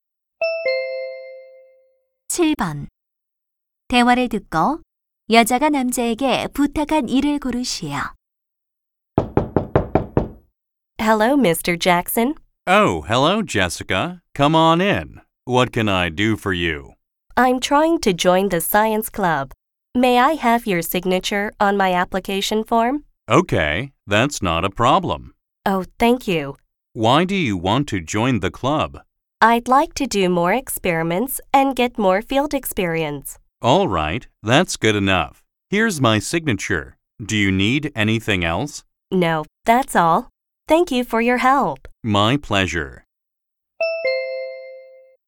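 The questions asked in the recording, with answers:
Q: 대화를 듣고 여자가 남자에게 부탁한 일을 고르시오.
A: 과학 동아리 가입 신청서에 서명해 주기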